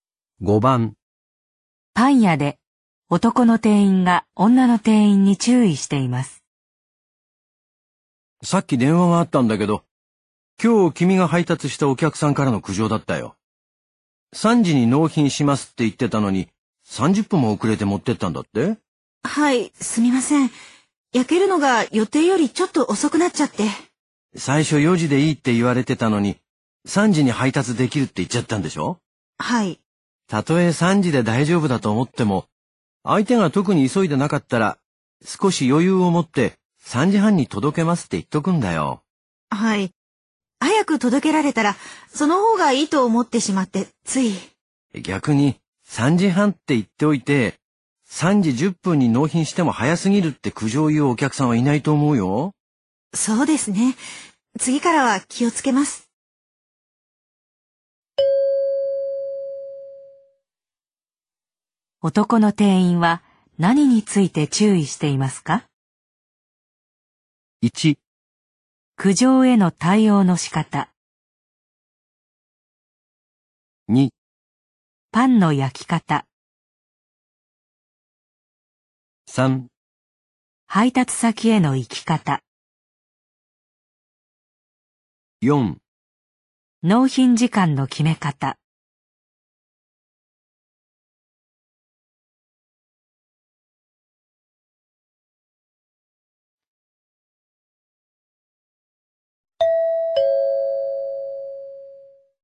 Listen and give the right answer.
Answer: 4

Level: N2 Listening · Test 12